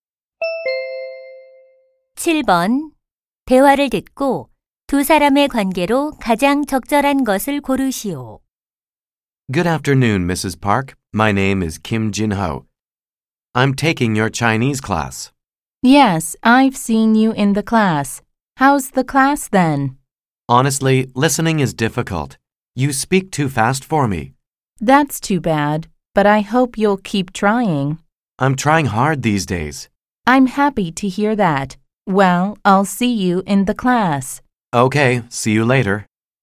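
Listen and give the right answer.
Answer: 교사와 학생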